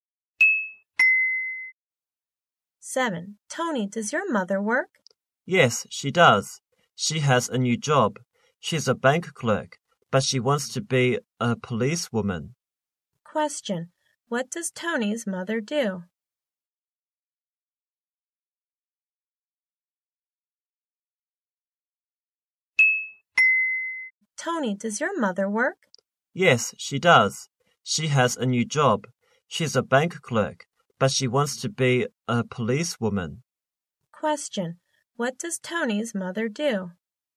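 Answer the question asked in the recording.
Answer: She's a bank clerk.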